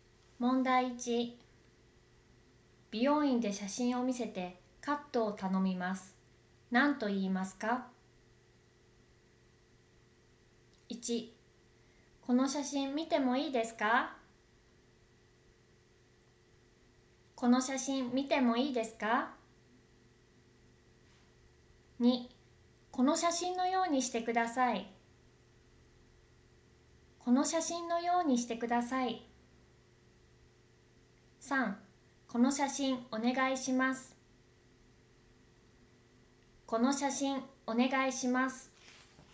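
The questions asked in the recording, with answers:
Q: 美容院で写真を見せてカットを頼みます。何と言いますか?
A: 2: この写真のようにしてください。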